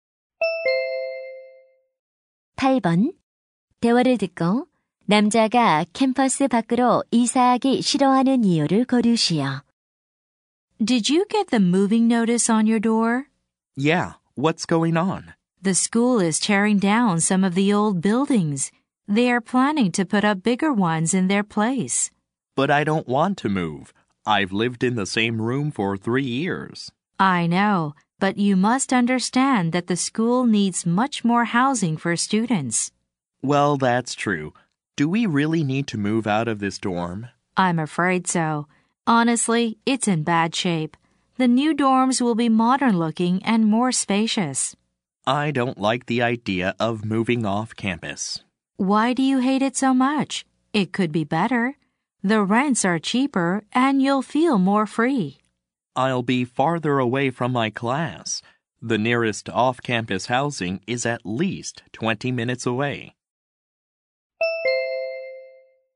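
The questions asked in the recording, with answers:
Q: 대화를 듣고 남자가 캠퍼스 밖으로 이사하기 싫어하는 이유를 고르시오.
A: 수업 듣는 곳에서 더 멀어져서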